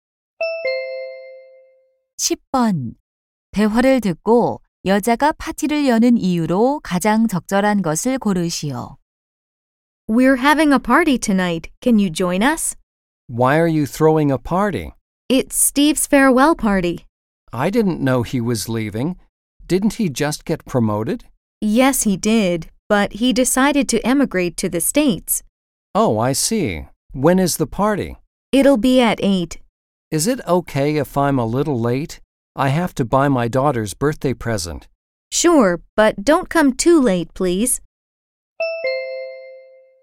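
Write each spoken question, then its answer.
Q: 대화를 듣고 여자가 파티를 여는 이유로 가장 적절한 것을 고르시오.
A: Steve의 송별회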